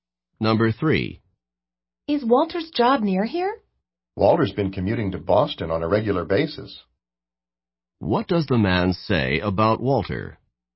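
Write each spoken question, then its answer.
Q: What does the man say about Walter?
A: Walter's job is not near here; he commutes to Boston regularly.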